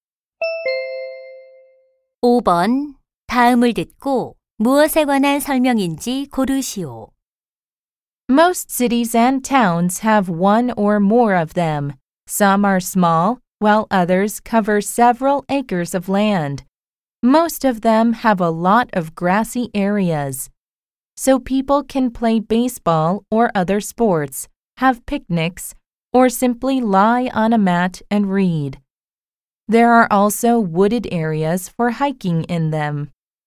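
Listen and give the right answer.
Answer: 공원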